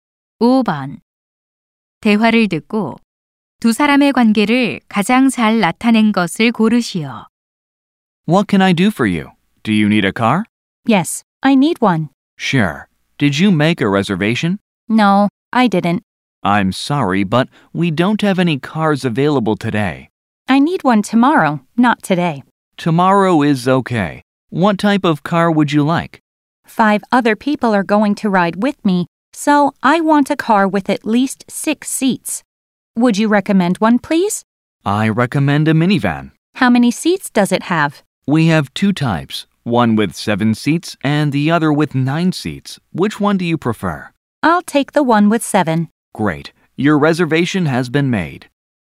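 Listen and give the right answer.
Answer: 렌터카 직원 - 고객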